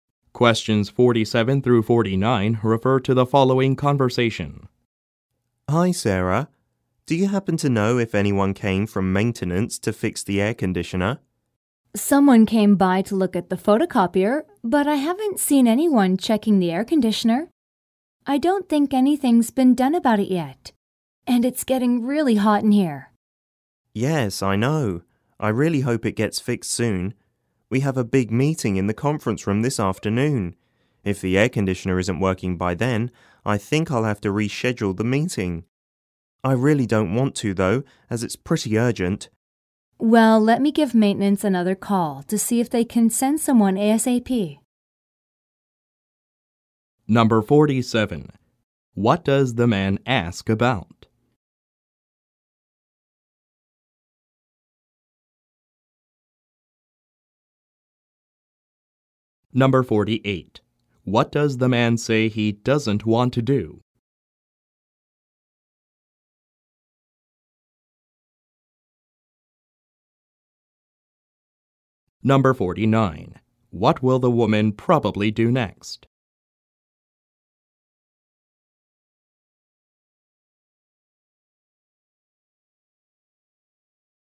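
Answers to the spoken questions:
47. Whether the air conditioner has been fixed
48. Reschedule the meeting
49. Call maintenance again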